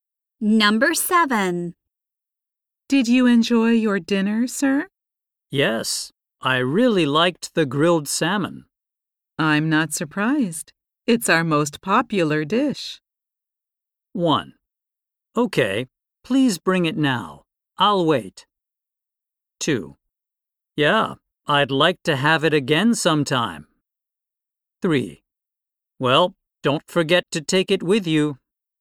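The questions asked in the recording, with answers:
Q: I'm not surprised. It's our most popular dish.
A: 2: Yeah, I'd like to have it again sometime.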